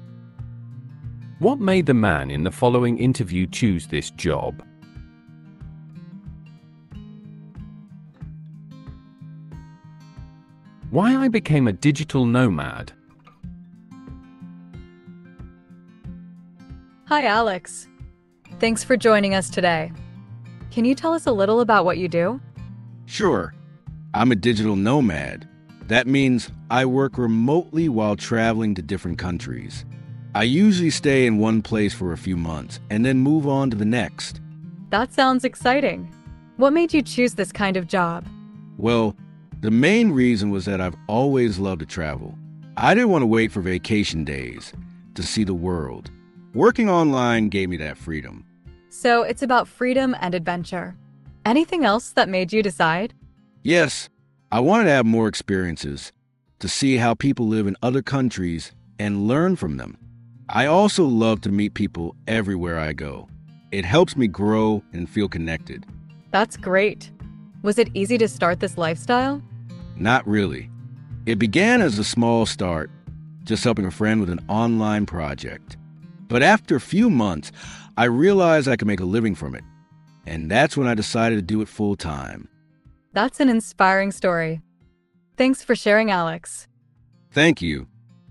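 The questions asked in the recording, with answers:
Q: What made the man in the following interview choose this job?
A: He has always loved to travel and wanted the freedom to see the world, have more experiences and meet people.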